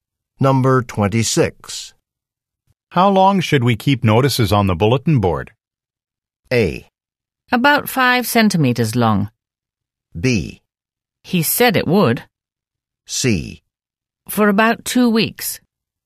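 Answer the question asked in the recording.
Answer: C: For about 2 weeks.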